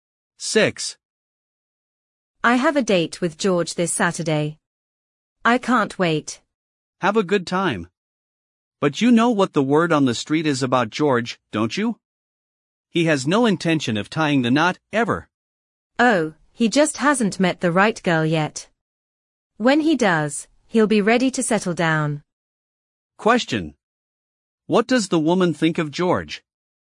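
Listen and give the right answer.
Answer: He will settle down once he meets the right girl.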